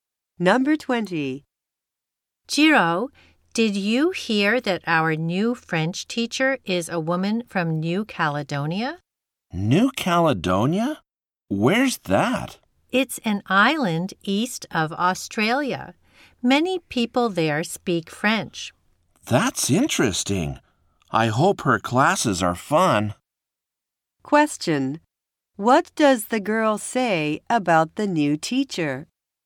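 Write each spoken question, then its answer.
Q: What does the girl say about the new teacher?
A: She is from New Caledonia.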